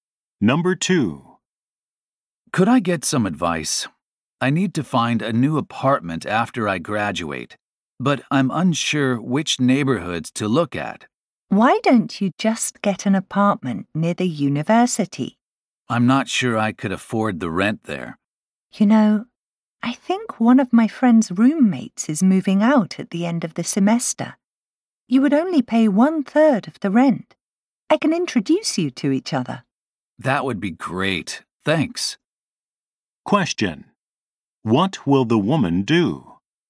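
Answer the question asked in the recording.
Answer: Meet someone whose roommate is moving out, so she may share an apartment and pay 1/3 of the rent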